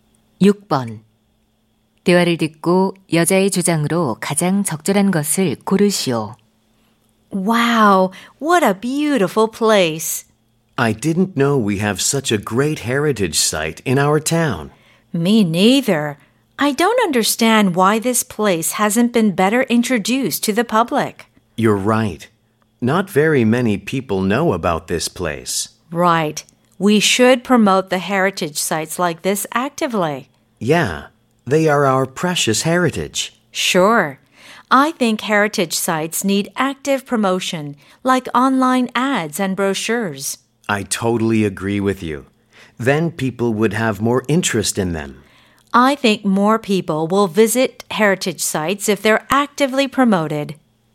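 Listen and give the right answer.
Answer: 문화유산은 적극적으로 홍보해야 한다.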